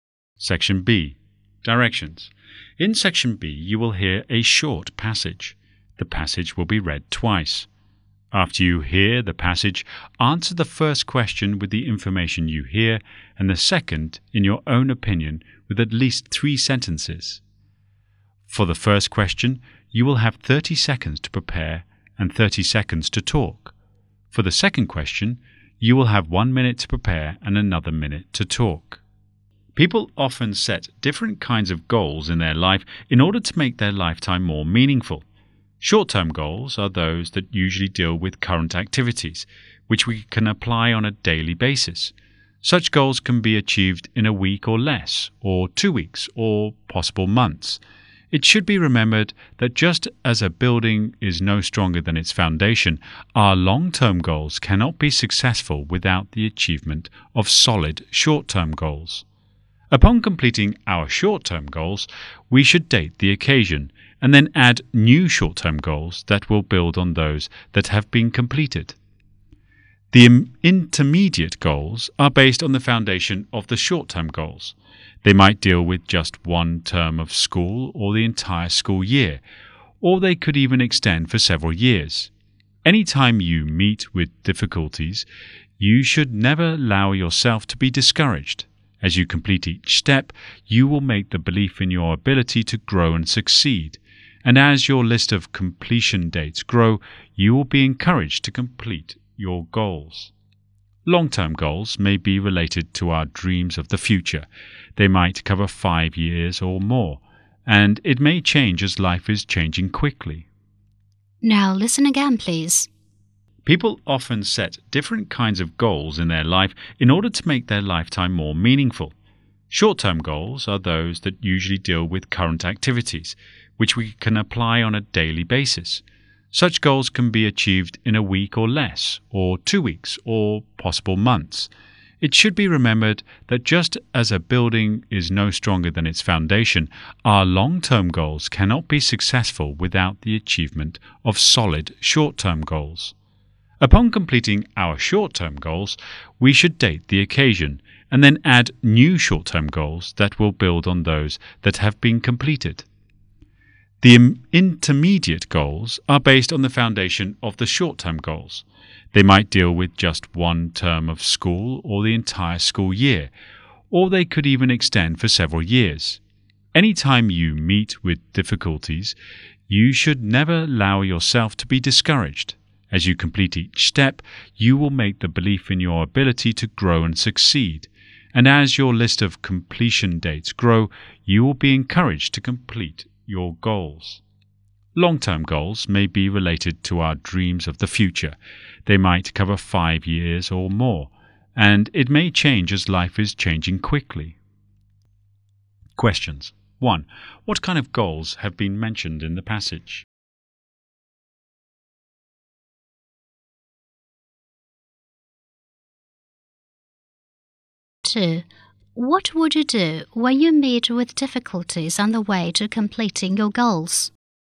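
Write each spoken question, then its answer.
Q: What kind of goals have been mentioned in the passage?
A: Short-term goals, intermediate goals and long-term goals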